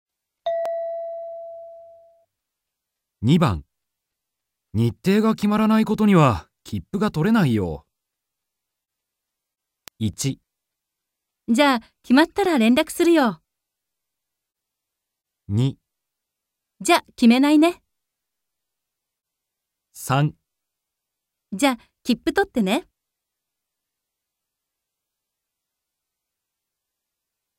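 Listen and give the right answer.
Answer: じゃ、決まったら連絡するよ。

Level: N2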